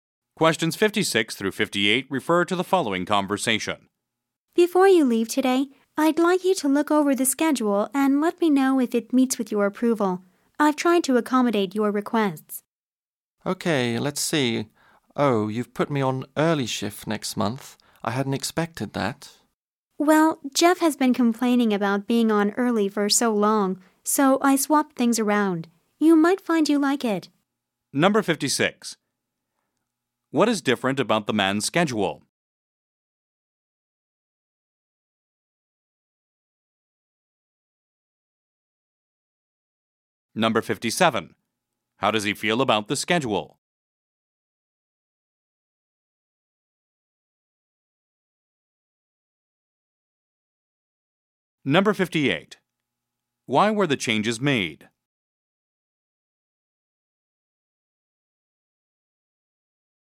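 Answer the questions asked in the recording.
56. He is on early shift next month
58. Jeff complained about being on early shift for so long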